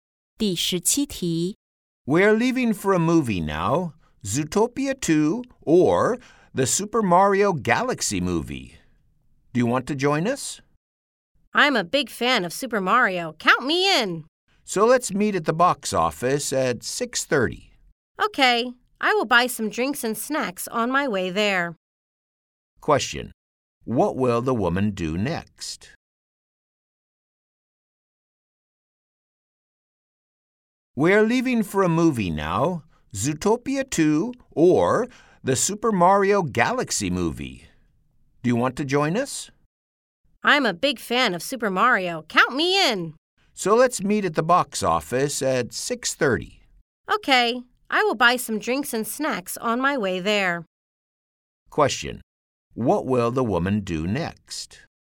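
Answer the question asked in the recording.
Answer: Buy some drinks and snacks on her way to the cinema.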